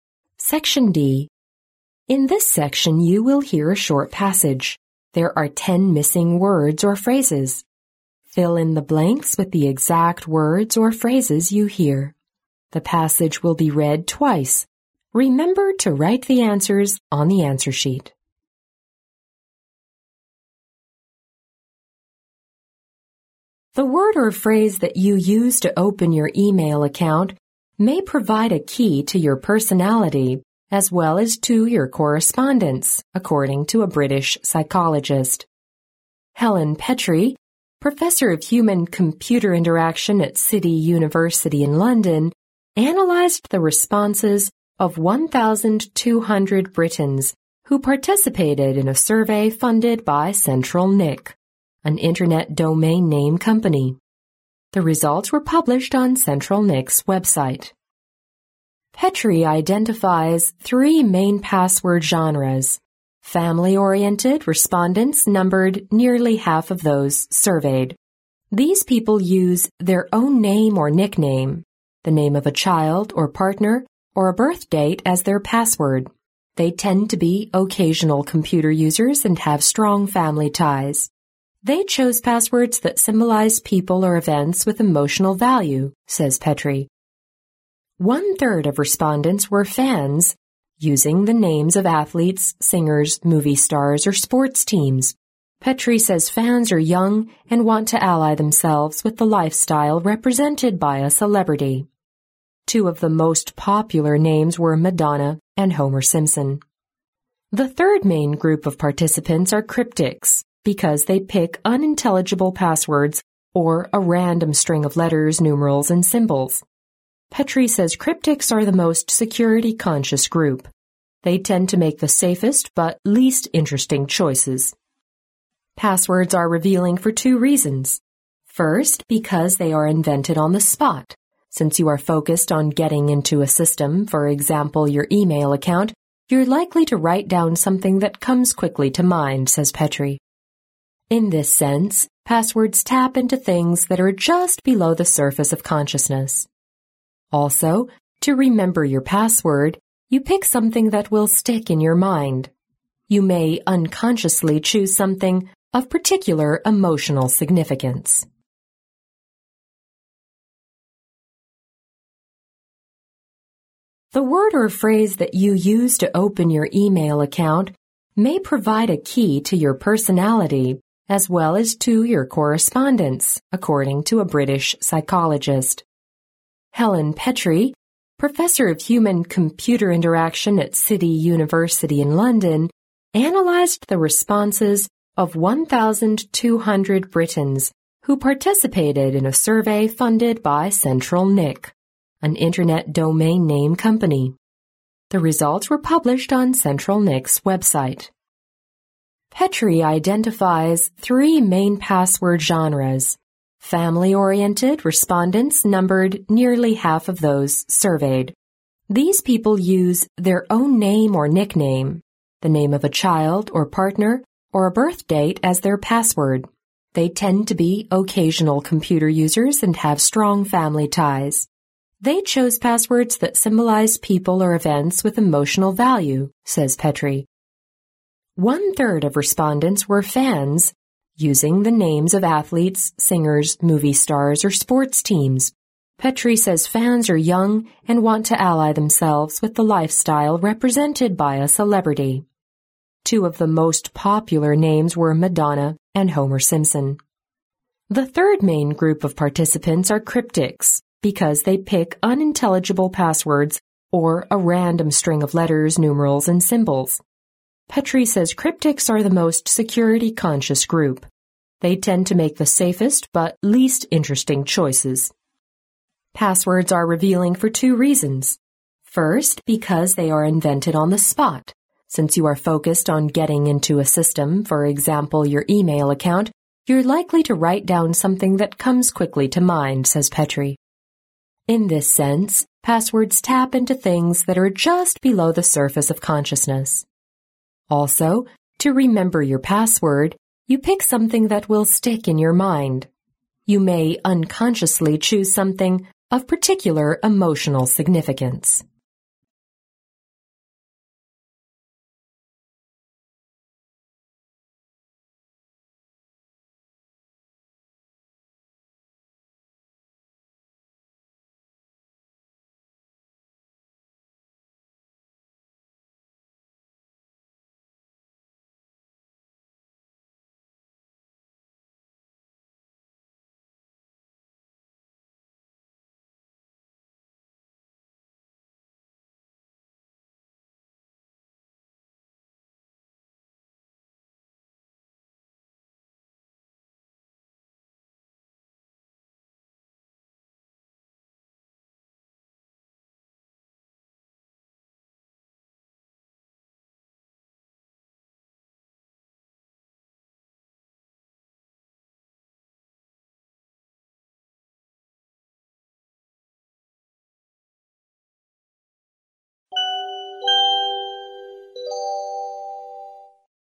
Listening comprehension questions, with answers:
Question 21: The word or phrase that you use to open your email account may provide a key to your personality as well as to your (21) ______, according to a British psychologist.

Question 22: Helen Petrie, professor of human-computer interaction at City University in London, analyzed the responses of 1,200 Britons who (22) ______ a survey funded by CentralNic, an Internet domain-name company.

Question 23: Petrie (23) ______ three main password "genres".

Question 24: They tend to be (24) ______ computer users and have strong (25) ______.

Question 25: They tend to be (24) ______ computer users and have strong (25) ______.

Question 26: Petrie says fans are young and want to (26) ______ the lifestyle represented by a celebrity.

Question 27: The third main group of participants are "cryptics" because they pick (27)______ passwords or a random string of letters, numerals, and symbols.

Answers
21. correspondence
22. participated in
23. identifies
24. occasional
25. family ties
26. ally themselves with
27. unintelligible

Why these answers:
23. 录音中提到"Petrie identifies three main password 'genres'(皮特里鉴定了三种主要的密码类型)"。identify意为"确认;鉴定"。
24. 录音中提到皮特里鉴定的第一种密码类型是"以家庭为重心的",接着又说这类人"Tend to be occasional computer users(往往只是偶尔用电脑)"。
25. 录音中提到皮特里鉴定的第一种"以家庭为重心的"人"...have strong family ties(拥有稳固的家庭关系)"。
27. 录音中提到"The third main group of participants are "cryptic" because they pick unintelligible passwords or a random string of letters, numerals, and symbols(第三类参与者的密码是'神秘型的',因为他们所选择的密码都是难以理解的,或者是随意的一组字母、数字和符号)"。unintelligible意为"莫名其妙的,无法理解的"。

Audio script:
The word or phrase that you use to open your email account may provide a key to your personality as well as to your correspondence, according to a British psychologist. Helen Petrie, professor of human-computer interaction at City University in London, analyzed the responses of 1,200 Britons who participated in a survey funded by CentralNic, an Internet domain-name company. The results were published on CentralNic's website.
Petrie identifies three main password "genres". "Family oriented" respondents numbered nearly half of those surveyed. These people use their own name or nickname, the name of a child, or partner, or a birth date as their password. They tend to be occasional computer users and have strong family ties. "They choose passwords that symbolize people or events with emotional value," says Petrie. One third of respondents were "fans", using the names of athletes, singers, movie stars, or sports teams. Petrie says fans are young and want to ally themselves with the lifestyle represented by a celebrity. Two of the most popular names were Madonna and Homer Simpson. The third main group of participants are "cryptics" because they pick unintelligible passwords or a random string of letters, numerals, and symbols. Petrie says cryptics are the most security conscious group. They tend to make the safest but least interesting choices.
Passwords are revealing for two reasons. First, because they are invented on the spot. "Since you are focused on getting into a system, for example your email account, you're likely to write down something that comes quickly to mind," says Petrie. "In this sense passwords tap into things that are just below the surface of consciousness. Also, to remember your password, you pick something that will stick in your mind. You may unconsciously choose something of particular emotional significance."